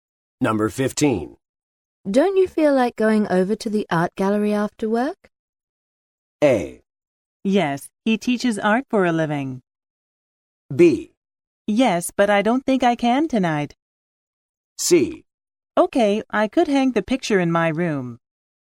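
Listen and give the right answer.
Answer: B: Yes, but I don't think I can tonight.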